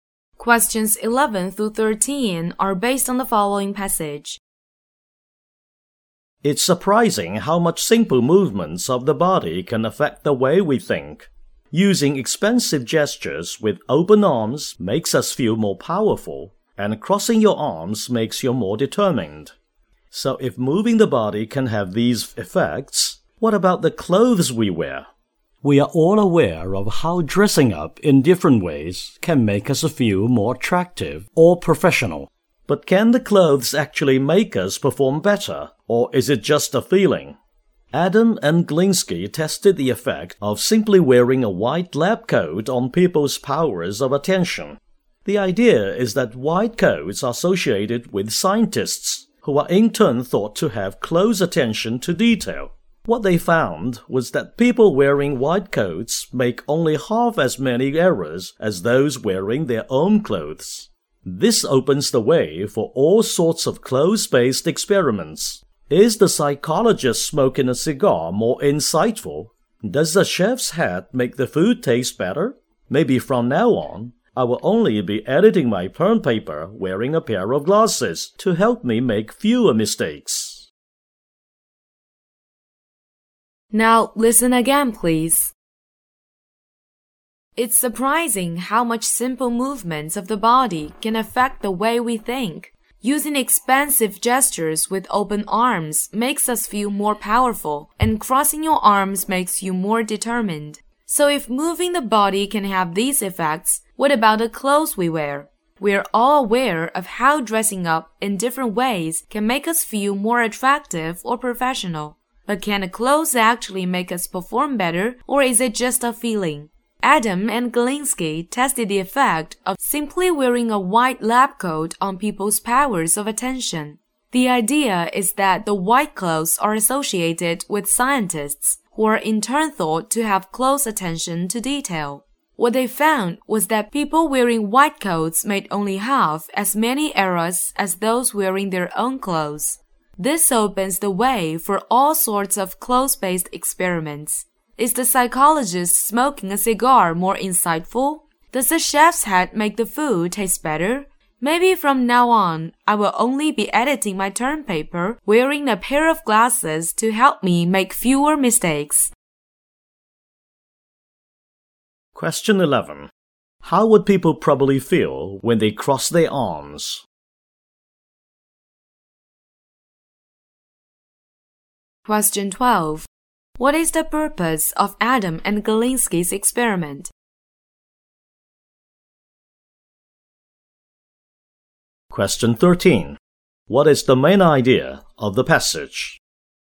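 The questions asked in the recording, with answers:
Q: How would people probably feel when they cross their arms?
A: More determined

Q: What is the purpose of Adam and Galinsky's experiment?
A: To test whether wearing a white lab coat affects people's attention

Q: What is the main idea of the passage?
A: The clothes we wear can affect how we think and perform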